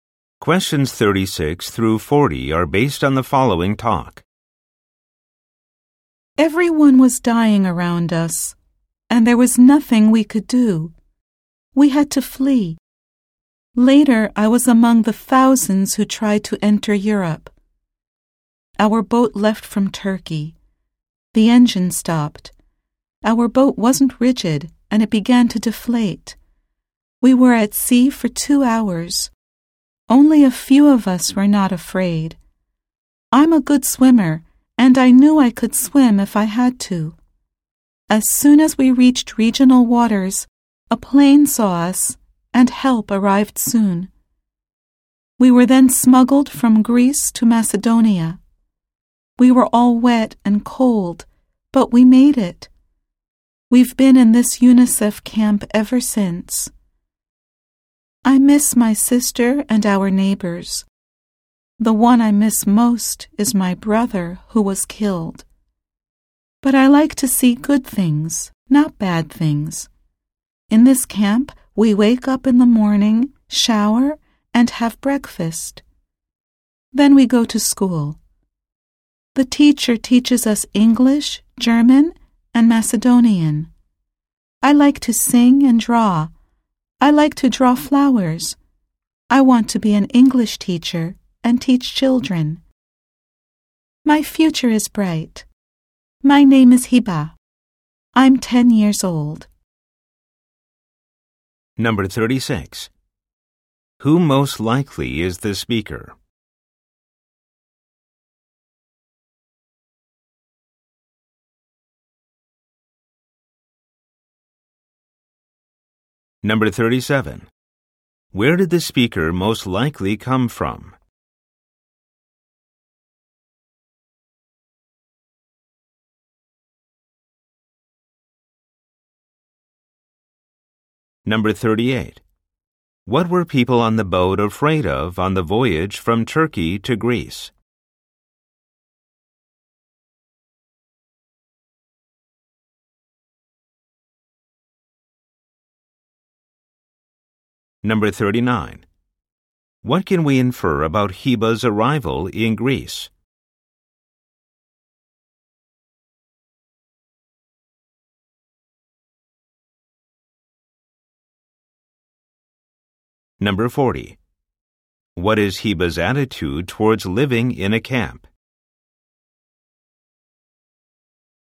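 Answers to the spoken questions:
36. A 10-year-old refugee girl
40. Positive and hopeful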